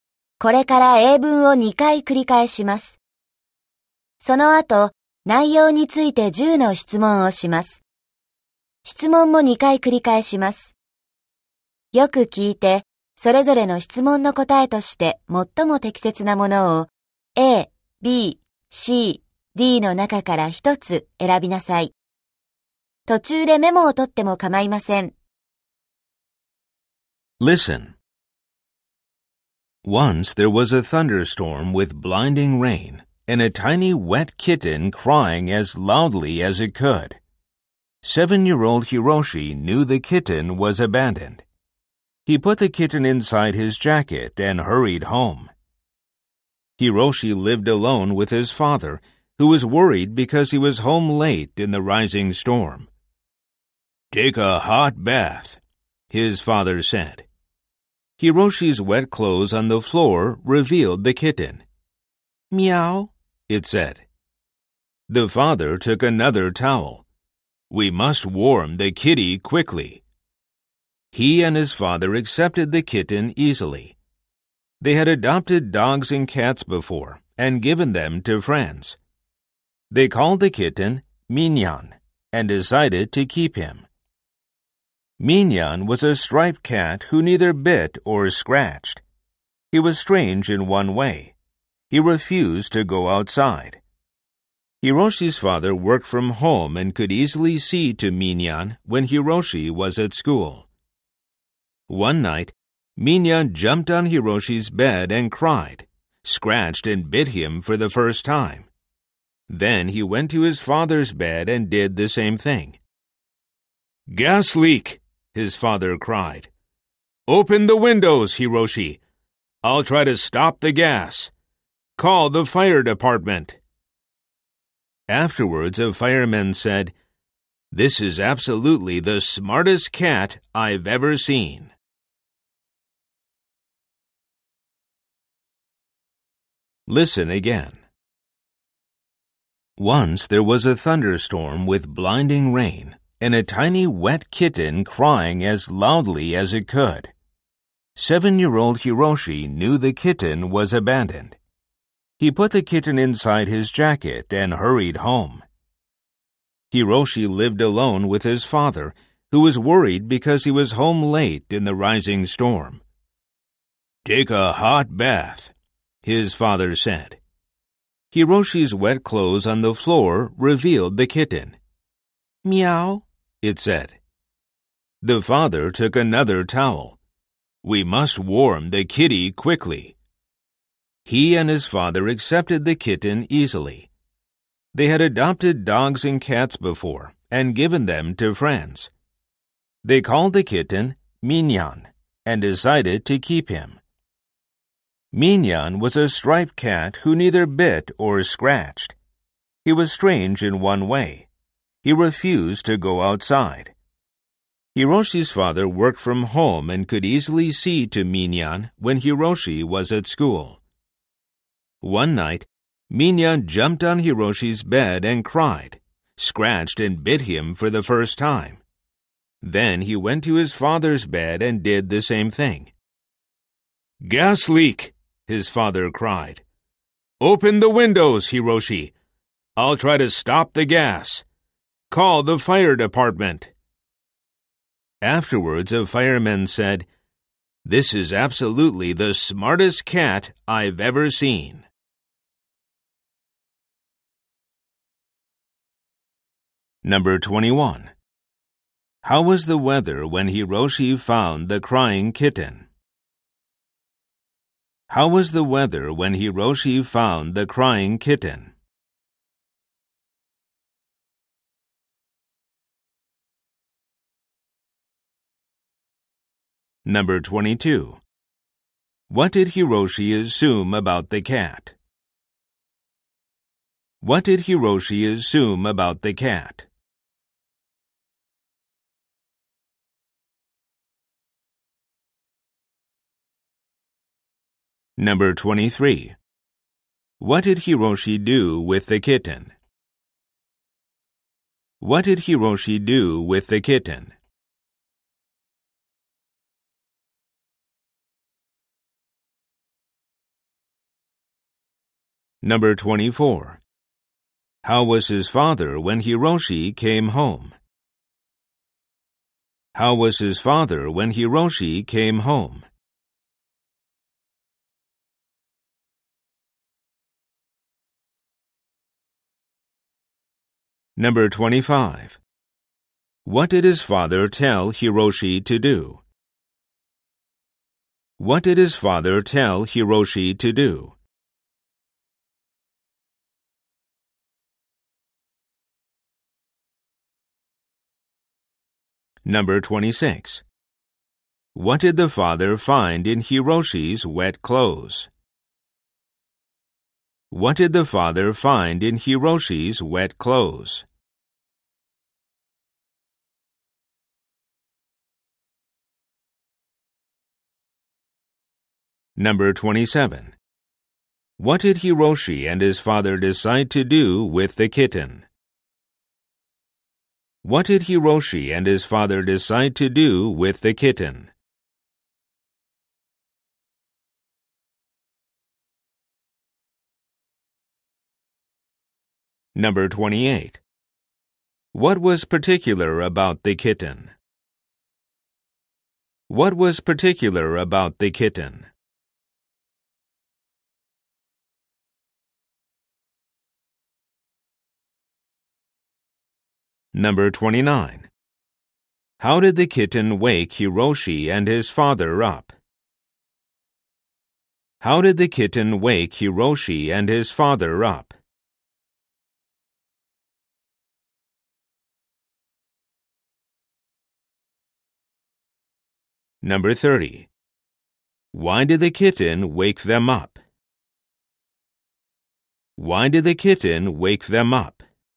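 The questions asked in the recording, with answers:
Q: How was the weather when Hiroshi found the crying kitten?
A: There was a thunderstorm with blinding rain.

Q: What did Hiroshi assume about the cat?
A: It was abandoned.

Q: What did Hiroshi do with the kitten?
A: He put it inside his jacket and hurried home.

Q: How was his father when Hiroshi came home?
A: Worried

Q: What did his father tell Hiroshi to do?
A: Take a hot bath

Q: What did the father find in Hiroshi's wet clothes?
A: The kitten

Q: What did Hiroshi and his father decide to do with the kitten?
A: Keep him

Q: What was particular about the kitten?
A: He refused to go outside.

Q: How did the kitten wake Hiroshi and his father up?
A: He jumped on their beds, cried, scratched and bit them.

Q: Why did the kitten wake them up?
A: There was a gas leak.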